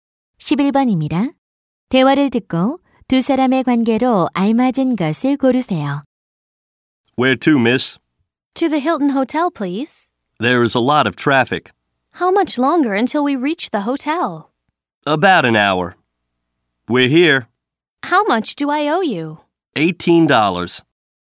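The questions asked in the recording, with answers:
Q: 대화를 듣고 두 사람의 관계로 알맞은 것을 고르세요.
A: 택시 기사와 승객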